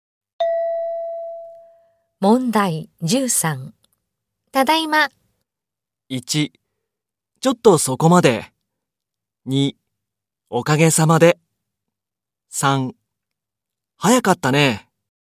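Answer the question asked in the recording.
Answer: 3: 早かったね。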